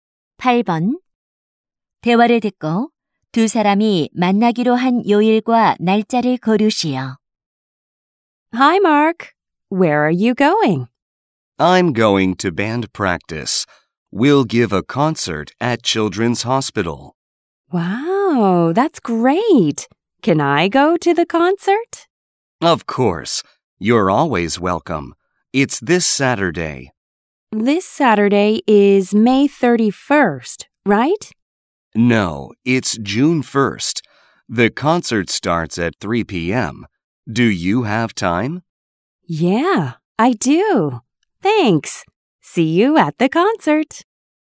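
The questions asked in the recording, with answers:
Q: 대화를 듣고 두 사람이 만나기로 한 요일과 날짜를 고르시오.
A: 토요일, 6월 1일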